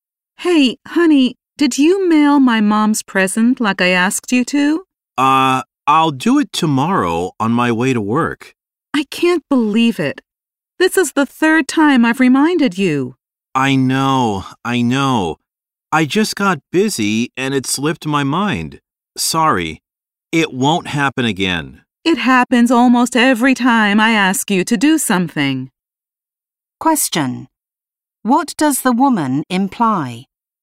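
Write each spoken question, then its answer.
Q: What does the woman imply?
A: The man often forgets to do what she asks him to do.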